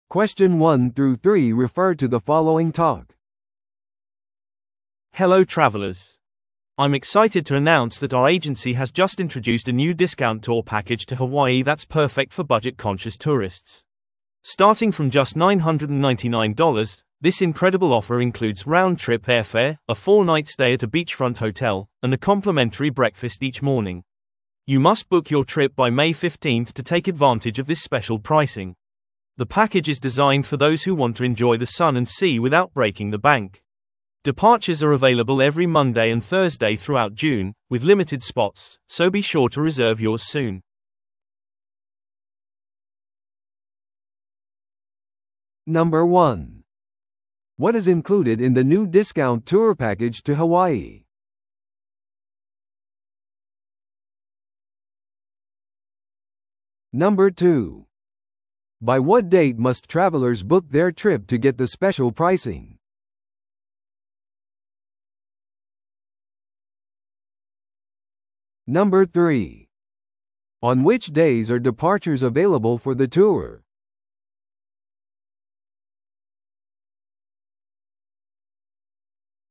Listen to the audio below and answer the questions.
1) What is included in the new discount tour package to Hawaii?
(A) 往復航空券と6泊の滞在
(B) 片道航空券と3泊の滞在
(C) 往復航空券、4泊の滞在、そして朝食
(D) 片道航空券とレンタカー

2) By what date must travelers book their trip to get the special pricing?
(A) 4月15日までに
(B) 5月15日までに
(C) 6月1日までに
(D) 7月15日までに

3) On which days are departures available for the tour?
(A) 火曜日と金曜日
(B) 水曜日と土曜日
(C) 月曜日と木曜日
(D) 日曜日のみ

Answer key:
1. C
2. B
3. C

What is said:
Hello travelers! I'm excited to announce that our agency has just introduced a new discount tour package to Hawaii that's perfect for budget-conscious tourists. Starting from just $999, this incredible offer includes round-trip airfare, a four-night stay at a beachfront hotel, and a complimentary breakfast each morning. You must book your trip by May 15th to take advantage of this special pricing. The package is designed for those who want to enjoy the sun and sea without breaking the bank. Departures are available every Monday and Thursday throughout June, with limited spots, so be sure to reserve yours soon!

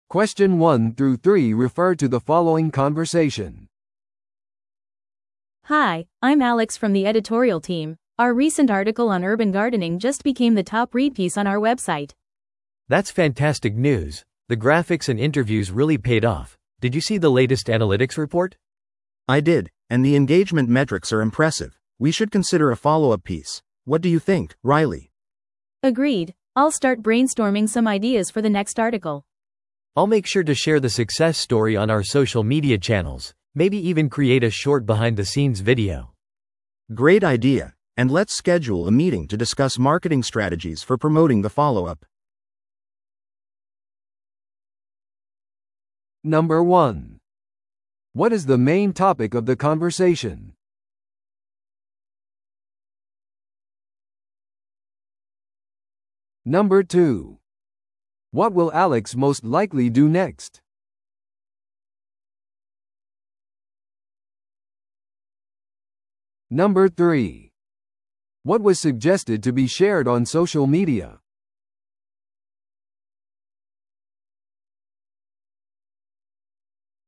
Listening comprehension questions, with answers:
Listen to the audio below and answer the questions.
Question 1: What is the main topic of the conversation?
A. 新しいウェブサイトデザインの立ち上げ。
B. チームミーティングのスケジューリング。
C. 記事の成功についての議論。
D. 都市園芸イベントの計画。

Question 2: What will Alex most likely do next?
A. 分析レポートを準備する。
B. 新しい記事のアイデアを考える。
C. 都市園芸についてのビデオを作成する。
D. ソーシャルメディアチャンネルを更新する。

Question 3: What was suggested to be shared on social media?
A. ウェブサイトのトラフィックに関する報告。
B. 最近の分析レポート。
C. エンゲージメントのあるグラフィックに関する話。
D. 記事の成功事例。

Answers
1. C
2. B
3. D

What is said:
A: Hi, I'm Alex from the editorial team. Our recent article on urban gardening just became the top-read piece on our website!
B: That's fantastic news! The graphics and interviews really paid off. Did you see the latest analytics report?
C: I did, and the engagement metrics are impressive. We should consider a follow-up piece. What do you think, Riley?
A: Agreed! I'll start brainstorming some ideas for the next article.
B: I'll make sure to share the success story on our social media channels, maybe even create a short behind-the-scenes video.
C: Great idea! And let's schedule a meeting to discuss marketing strategies for promoting the follow-up.

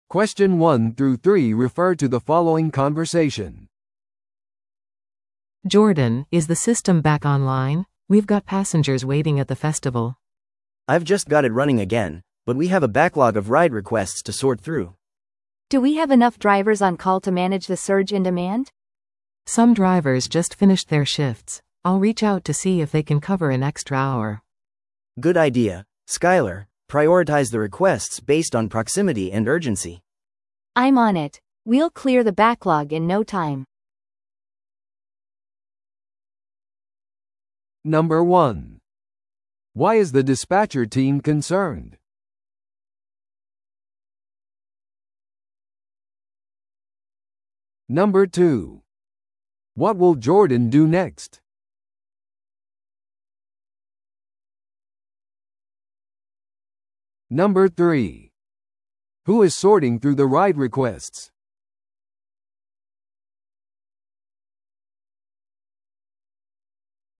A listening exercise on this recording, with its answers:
Listen to the audio below and answer the questions.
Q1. Why is the dispatcher team concerned?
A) ドライバーがストライキをしている。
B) 忙しい時間にアプリがクラッシュした。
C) フェスティバルが予期せずに中止された。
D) 乗客が返金を要求している。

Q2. Who is sorting through the ride requests?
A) 会話にいるスピーカーの1人。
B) システムを修正した男性。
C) ジョーダンのアシスタント。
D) スカイラー。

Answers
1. B
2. D

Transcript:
A: Jordan, is the system back online? We've got passengers waiting at the festival.
B: I've just got it running again, but we have a backlog of ride requests to sort through.
C: Do we have enough drivers on call to manage the surge in demand?
A: Some drivers just finished their shifts. I'll reach out to see if they can cover an extra hour.
B: Good idea. Skyler, prioritize the requests based on proximity and urgency.
C: I'm on it. We'll clear the backlog in no time.

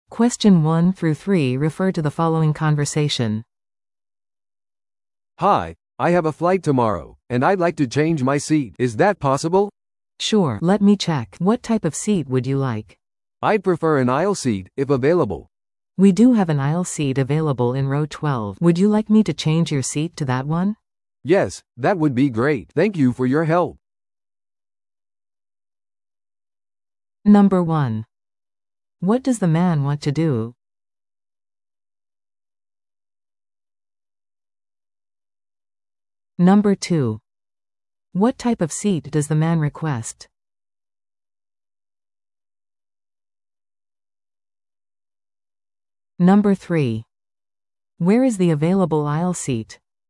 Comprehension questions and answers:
Listen to the audio below and answer the questions.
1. What does the man want to do?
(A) フライトの日付を変更する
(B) ファーストクラスにアップグレードする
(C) 座席を変更する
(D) フライトをキャンセルする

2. What type of seat does the man request?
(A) 窓側の席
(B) 通路側の席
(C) 真ん中の席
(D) バルクヘッド席(最前列)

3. Where is the available aisle seat?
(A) 5列目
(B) 12列目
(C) 20列目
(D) 25列目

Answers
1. C
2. B
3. B

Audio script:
A: "Hi, I have a flight tomorrow, and I'd like to change my seat. Is that possible?"
B: "Sure. Let me check. What type of seat would you like?"
A: "I'd prefer an aisle seat, if available."
B: "We do have an aisle seat available in row 12. Would you like me to change your seat to that one?"
A: "Yes, that would be great. Thank you for your help!"

